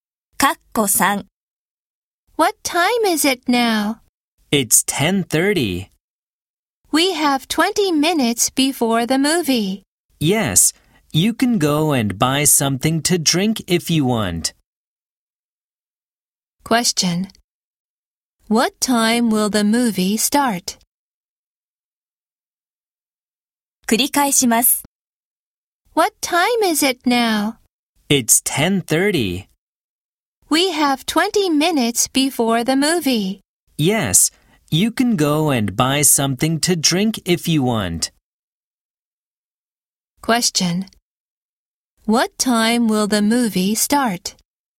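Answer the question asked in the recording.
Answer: 10:50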